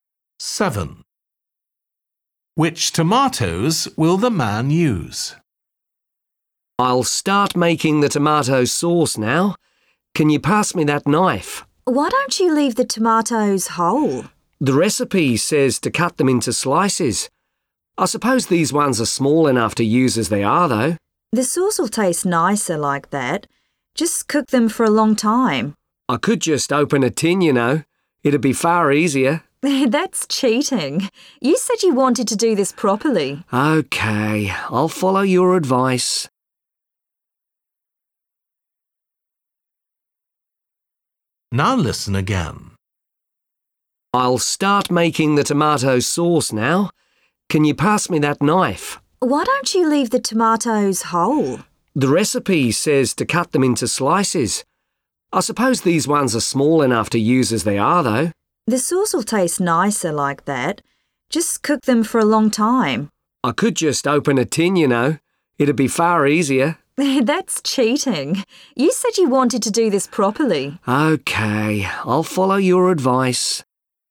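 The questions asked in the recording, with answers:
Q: Which tomatoes will the man use?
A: Small fresh tomatoes, left whole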